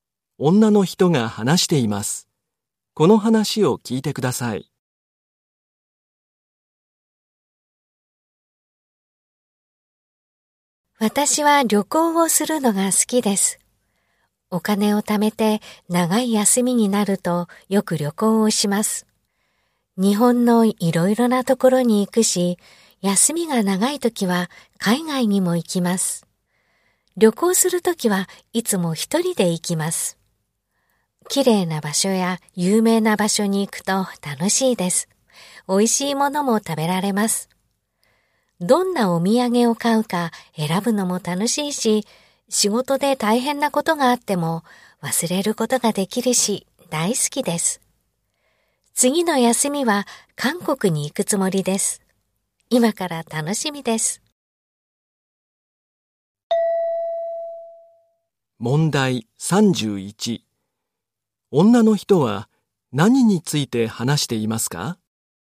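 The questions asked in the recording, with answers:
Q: 女の人は何について話していますか?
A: 旅行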